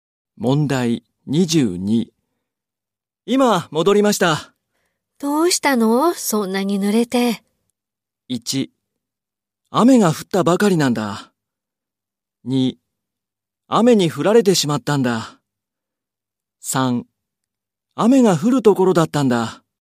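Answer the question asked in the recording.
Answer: 2: 雨に降られてしまったんだ。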